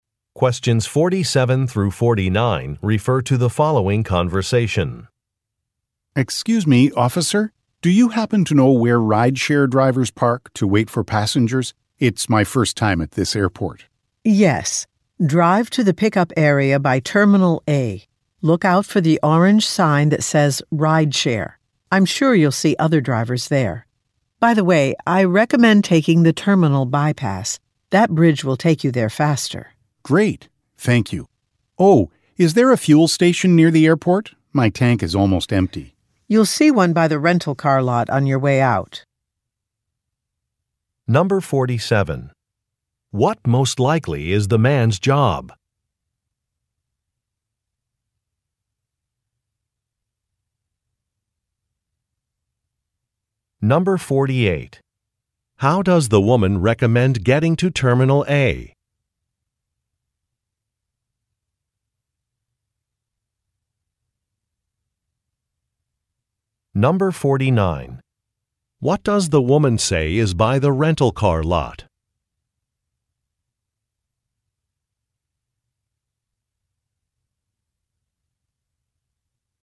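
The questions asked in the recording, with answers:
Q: What most likely is the man's job?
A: Rideshare driver

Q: How does the woman recommend getting to Terminal A?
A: By taking the terminal bypass (bridge)

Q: What does the woman say is by the rental car lot?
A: A fuel station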